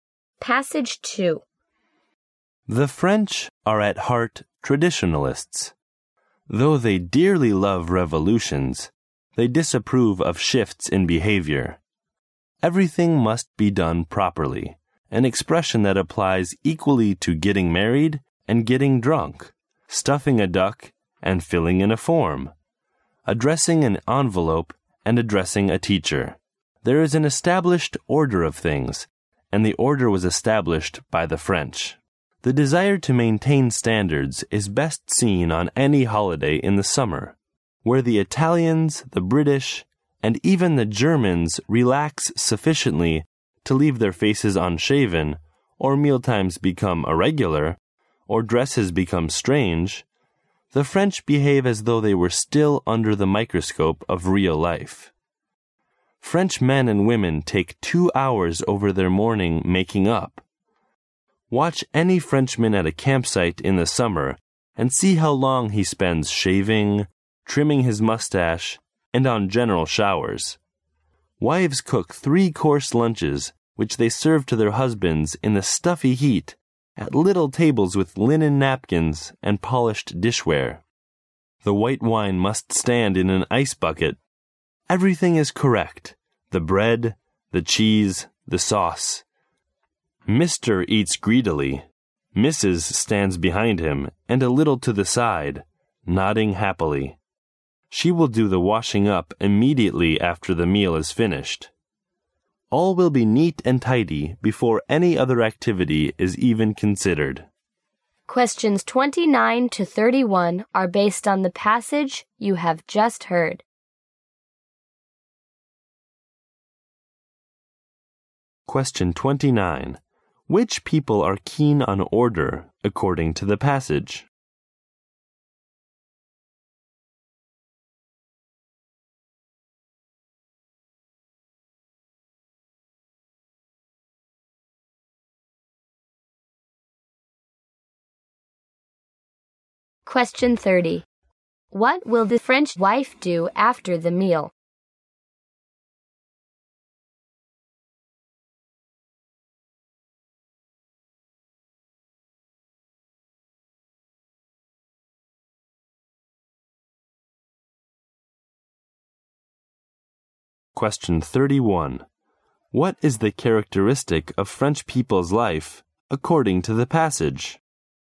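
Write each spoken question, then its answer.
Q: Which people are keen on order, according to the passage?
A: The French

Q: What will the French wife do after the meal?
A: Do the washing up immediately

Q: What is the characteristic of French people's life, according to the passage?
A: Everything must be done properly and in order, even on holiday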